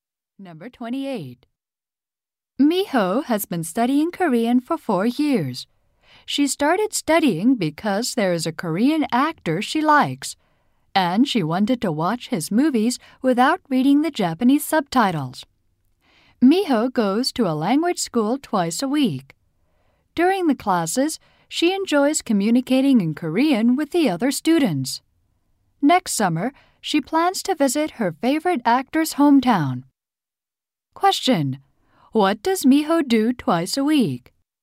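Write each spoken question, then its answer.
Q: What does Miho do twice a week?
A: Goes to a language school to study Korean.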